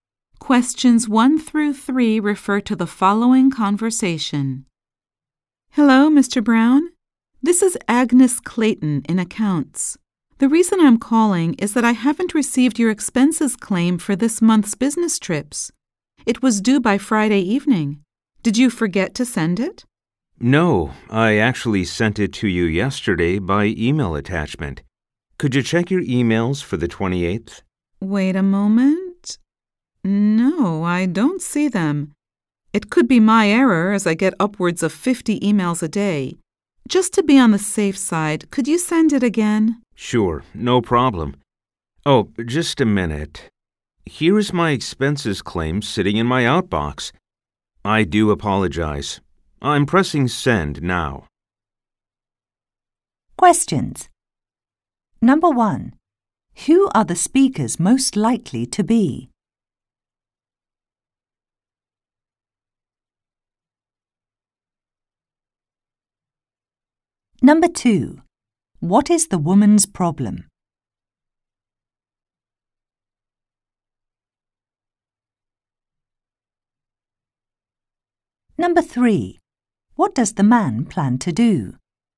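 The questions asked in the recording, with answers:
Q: What is the woman's problem?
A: She hasn't received the man's expenses claim

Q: What does the man plan to do?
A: Send his expenses claim again by email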